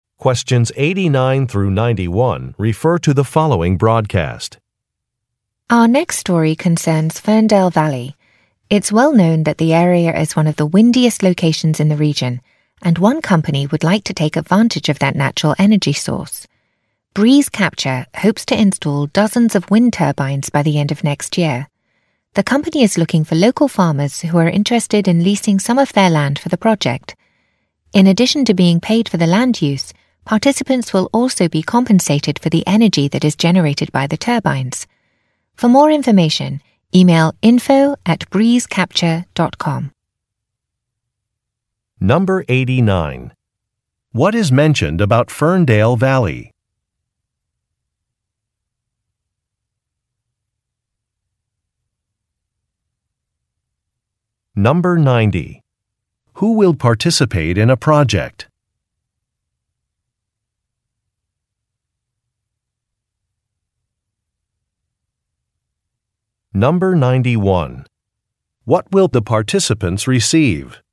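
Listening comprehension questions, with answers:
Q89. What is mentioned about Ferndale Valley?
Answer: It is very windy.

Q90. Who will participate in a project?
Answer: Farmers

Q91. What will the participants receive?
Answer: Financial compensation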